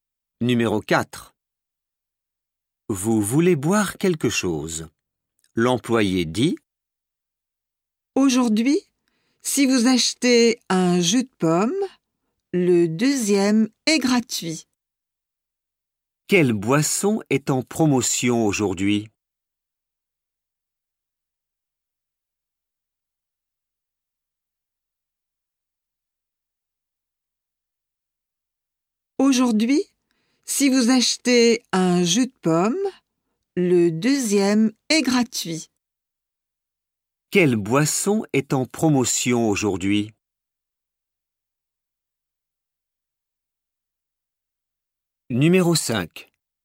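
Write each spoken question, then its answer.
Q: Quelle boisson est en promotion aujourd'hui?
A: Le jus de pomme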